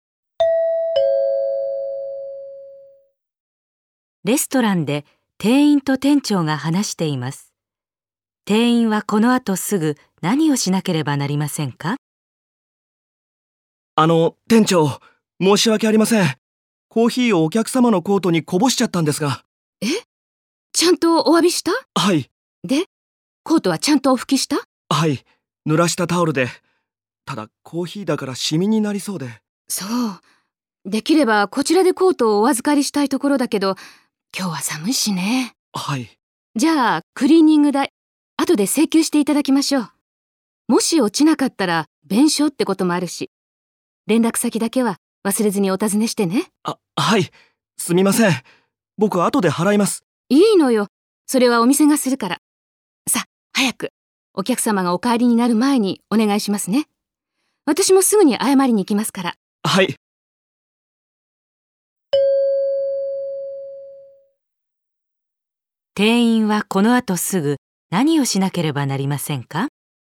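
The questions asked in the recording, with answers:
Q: 店員はこの後すぐ何をしなければなりませんか?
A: お客様に連絡先を尋ねる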